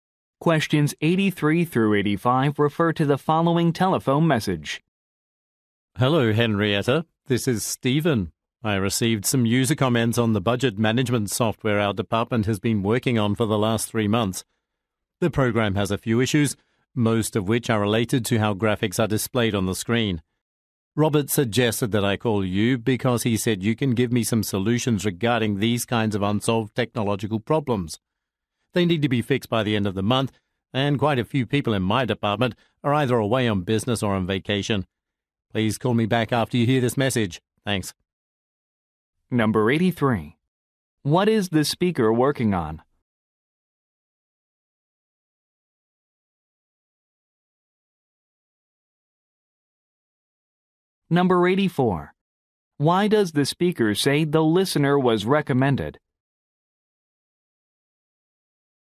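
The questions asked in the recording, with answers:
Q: What is the speaker working on?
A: Budget management software

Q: Why does the speaker say the listener was recommended?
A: She can give solutions to technological problems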